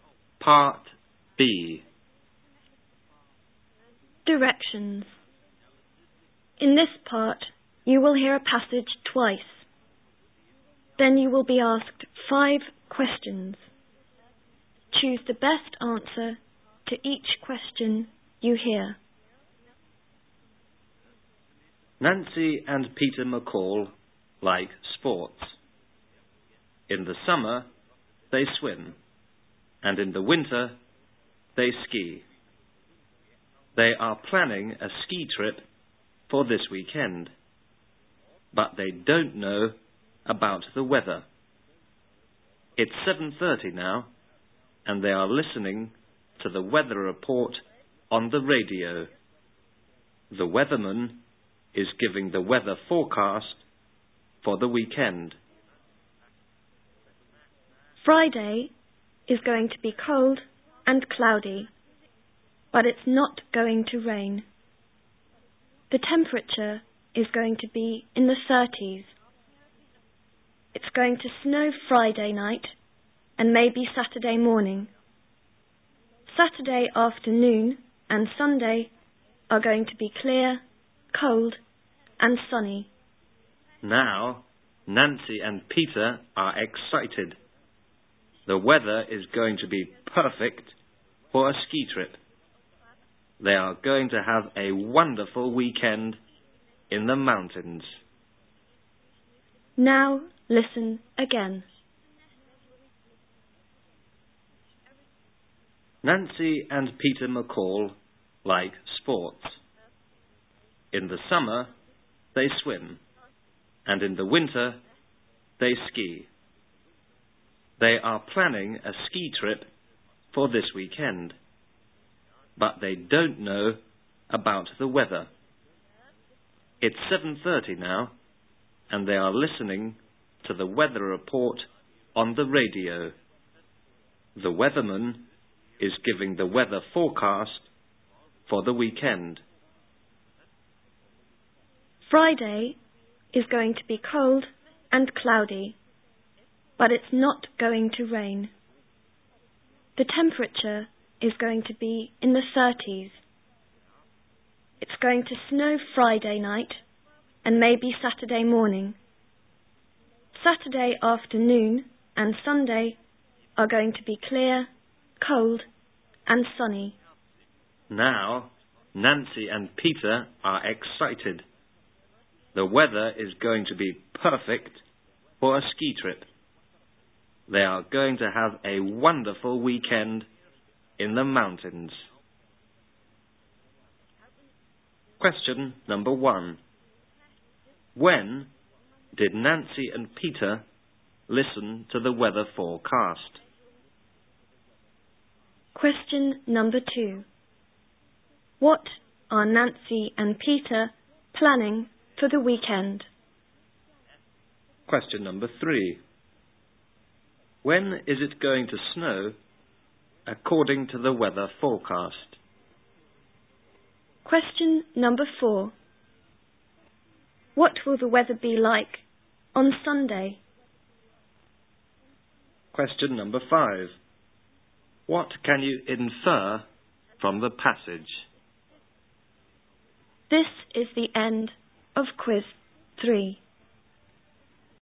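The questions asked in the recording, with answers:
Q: When did Nancy and Peter listen to the weather forecast?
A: At 7:30

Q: What are Nancy and Peter planning for the weekend?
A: A ski trip

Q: When is it going to snow according to the weather forecast?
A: Friday night and maybe Saturday morning

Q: What will the weather be like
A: Clear, cold and sunny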